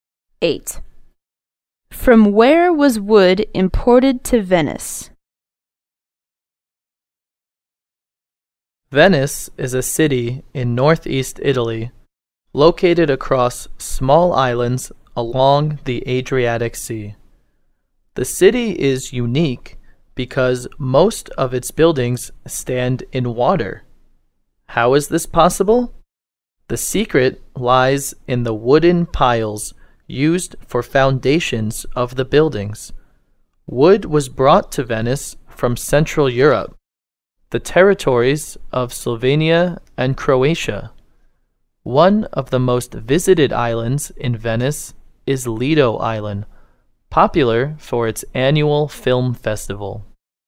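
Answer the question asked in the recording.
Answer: From Central Europe (Slovenia and Croatia)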